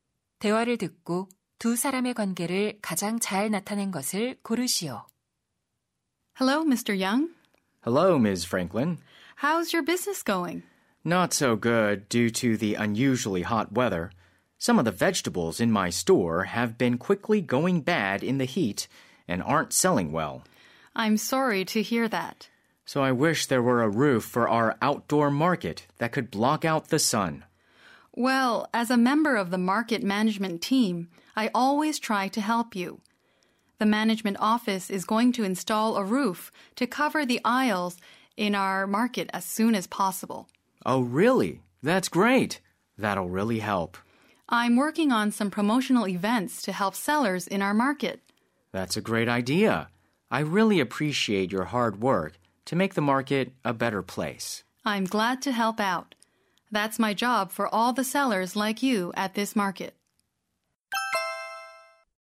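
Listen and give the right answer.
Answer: 채소 가게 상인 - 시장 관리 직원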